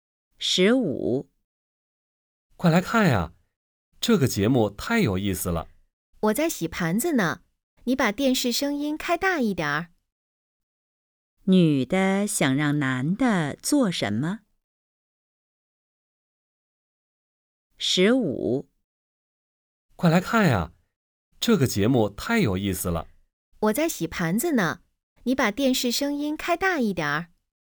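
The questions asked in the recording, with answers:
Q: 女的想让男的做什么?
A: 把电视声音开大一点儿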